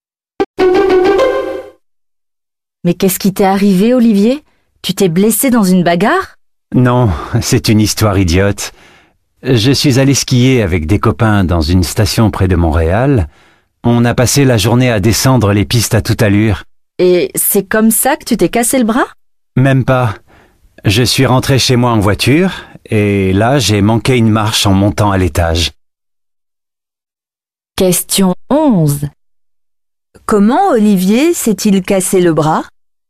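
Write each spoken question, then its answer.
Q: Comment Olivier s'est-il cassé le bras?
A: Il a manqué une marche en montant l'escalier chez lui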